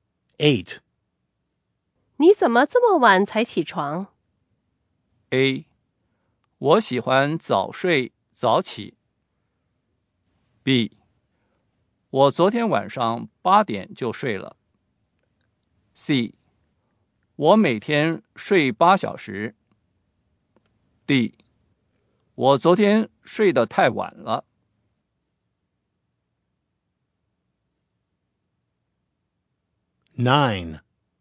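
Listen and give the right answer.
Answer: D: 我昨天睡得太晚了。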